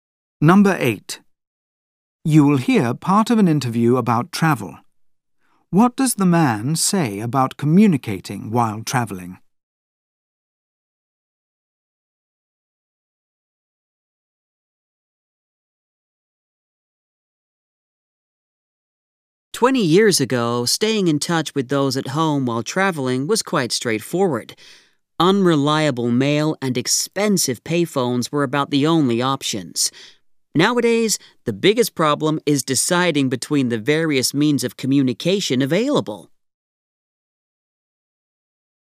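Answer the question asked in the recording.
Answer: Now the problem is choosing among many means of communication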